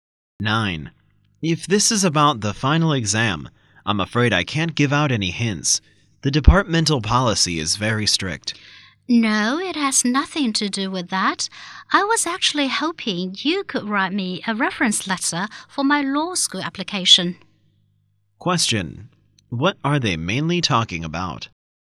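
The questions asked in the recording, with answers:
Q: What are they mainly talking about?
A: A reference letter for a law school application.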